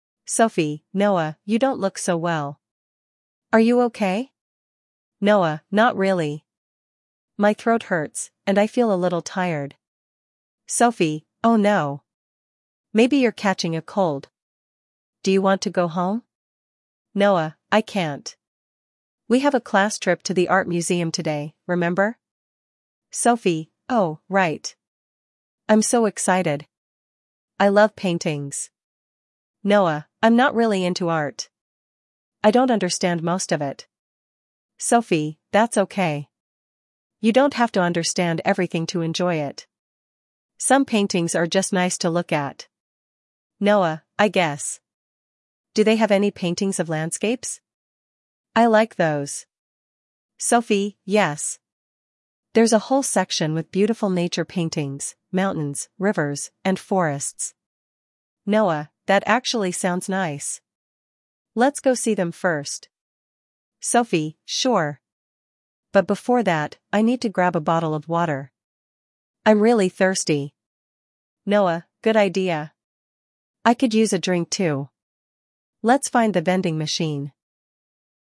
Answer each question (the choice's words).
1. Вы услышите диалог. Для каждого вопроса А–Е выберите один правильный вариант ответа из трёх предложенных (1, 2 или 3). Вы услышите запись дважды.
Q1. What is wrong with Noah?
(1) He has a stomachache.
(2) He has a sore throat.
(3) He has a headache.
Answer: He has a sore throat.

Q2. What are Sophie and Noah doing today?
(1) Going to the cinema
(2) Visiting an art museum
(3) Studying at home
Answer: Visiting an art museum

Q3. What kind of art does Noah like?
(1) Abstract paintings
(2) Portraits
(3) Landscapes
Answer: Landscapes

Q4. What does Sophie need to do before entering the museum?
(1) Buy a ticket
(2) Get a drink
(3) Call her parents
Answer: Get a drink

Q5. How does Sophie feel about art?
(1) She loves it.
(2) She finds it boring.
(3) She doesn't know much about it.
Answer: She loves it.

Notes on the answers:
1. Noah has a sore throat → 2
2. They are visiting an art museum → 2
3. Noah likes landscapes → 3
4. Sophie needs to get a drink → 2
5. Sophie loves art → 1

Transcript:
Sophie: Noah, you don't look so well. Are you okay?
Noah: Not really. My throat hurts, and I feel a little tired.
Sophie: Oh no! Maybe you're catching a cold. Do you want to go home?
Noah: I can't. We have a class trip to the art museum today, remember?
Sophie: Oh, right! I'm so excited. I love paintings.
Noah: I'm not really into art. I don't understand most of it.
Sophie: That's okay. You don't have to understand everything to enjoy it. Some paintings are just nice to look at.
Noah: I guess. Do they have any paintings of landscapes? I like those.
Sophie: Yes! There's a whole section with beautiful nature paintings, mountains, rivers, and forests.
Noah: That actually sounds nice. Let's go see them first.
Sophie: Sure! But before that, I need to grab a bottle of water. I'm really thirsty.
Noah: Good idea. I could use a drink too. Let's find the vending machine.